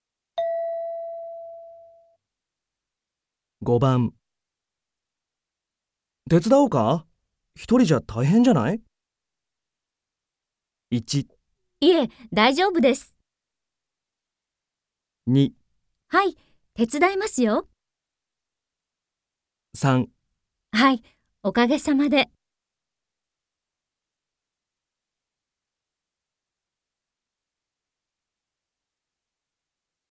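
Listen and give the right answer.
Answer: いえ、大丈夫です。

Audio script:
M:手伝おうか? 一人じゃ大変じゃない?
F:1 いえ、大丈夫です。
2 はい、手伝いますよ。
3 はい、おかげさまで。

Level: N3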